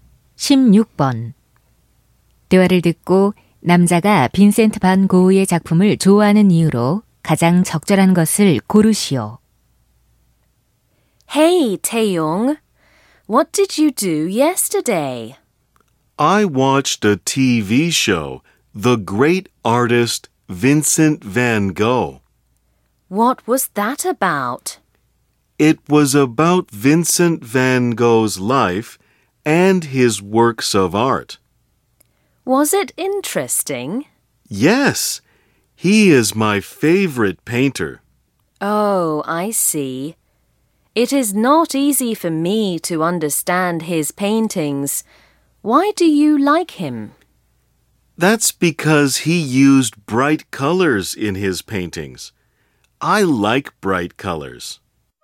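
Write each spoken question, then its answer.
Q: 대화를 듣고 남자가 빈센트 반 고흐의 작품을 좋아하는 이유로 가장 적절한 것을 고르시오.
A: 그림에 밝은 색을 사용해서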